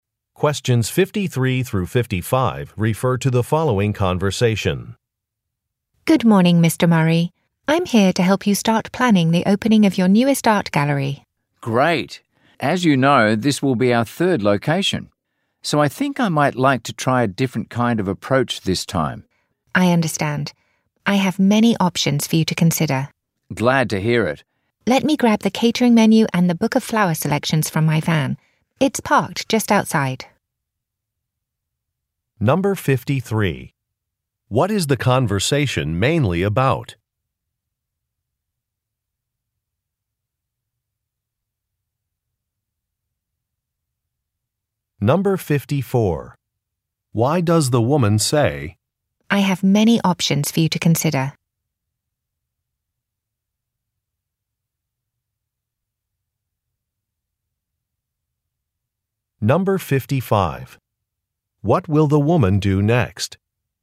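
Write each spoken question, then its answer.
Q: What is the conversation mainly about?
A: Planning the opening of a new art gallery

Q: What will the woman do next?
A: Get the catering menu and flower book from her van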